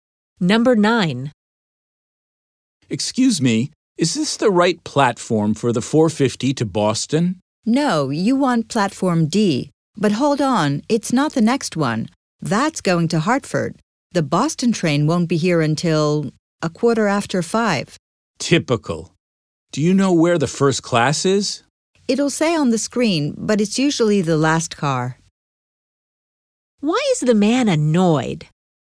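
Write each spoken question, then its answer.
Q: Why is the man annoyed?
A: His train to Boston won't arrive until 4:15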